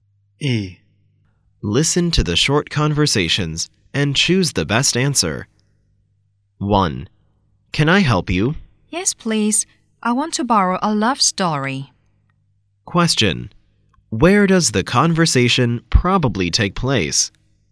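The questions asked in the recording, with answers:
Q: Where does the conversation probably take place?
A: In a library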